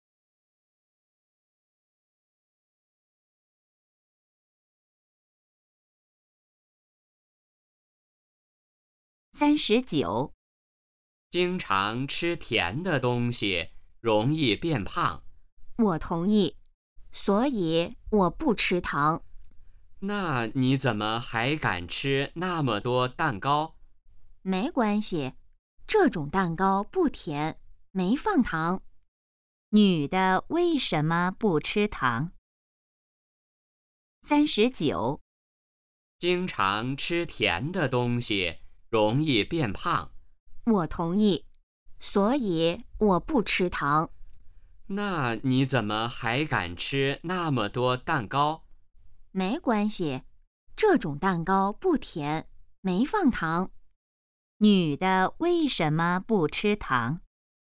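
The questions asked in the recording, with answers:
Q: 女的为什么不吃糖?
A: 吃甜的东西容易变胖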